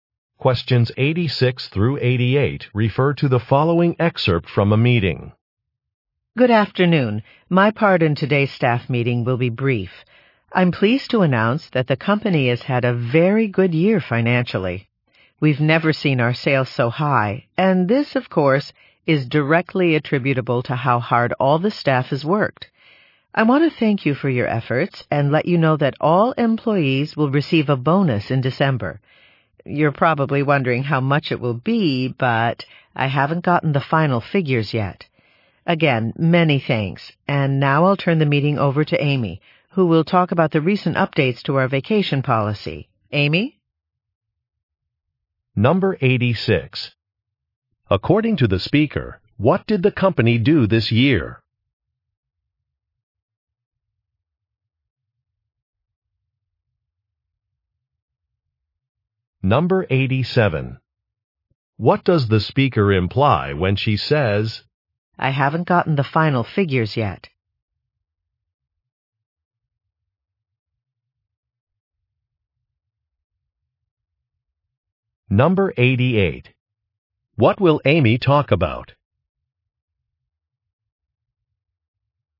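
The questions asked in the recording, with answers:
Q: According to the speaker, what did the company do this year?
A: It had record-high sales

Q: What will Amy talk about?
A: Updates to the vacation policy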